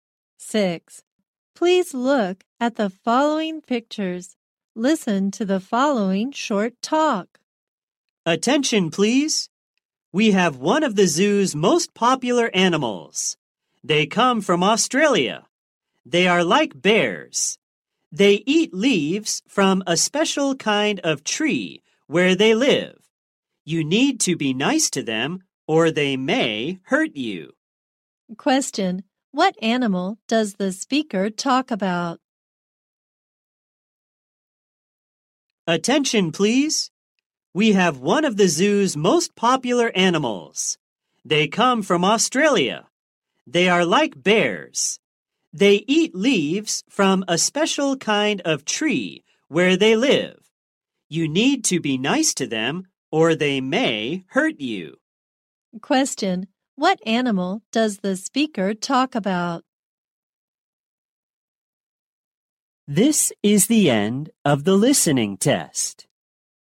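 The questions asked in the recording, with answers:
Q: Question. What animal does the speaker talk about?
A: Koalas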